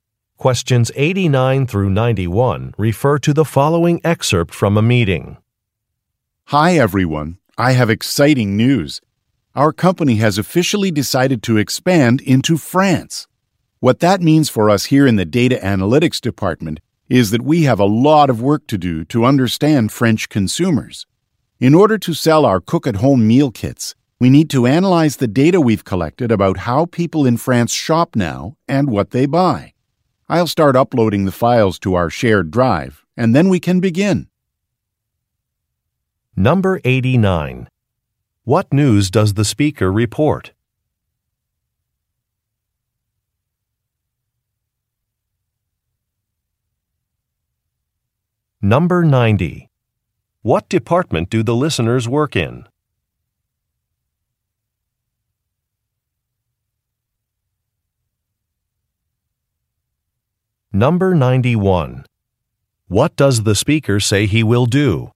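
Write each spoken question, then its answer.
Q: What news does the speaker report?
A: The company is expanding into France.

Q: What department do the listeners work in?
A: Data analytics

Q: What does the speaker say he will do?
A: Upload files to the shared drive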